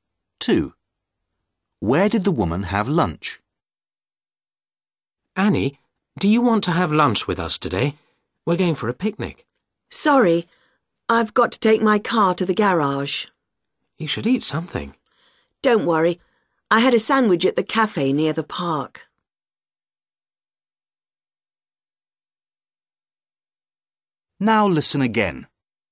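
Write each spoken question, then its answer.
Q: Where did the woman have lunch?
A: At the cafe near the park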